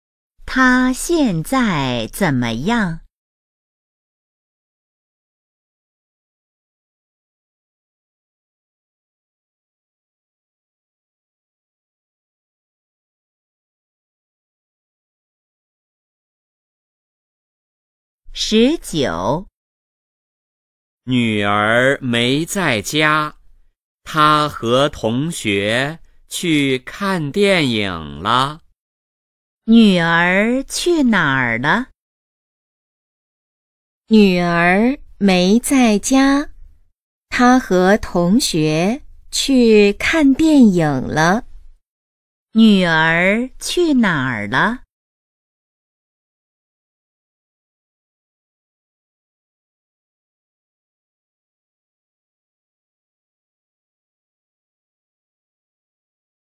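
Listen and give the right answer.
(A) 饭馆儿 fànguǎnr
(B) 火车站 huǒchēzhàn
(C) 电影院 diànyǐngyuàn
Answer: (C) 电影院 diànyǐngyuàn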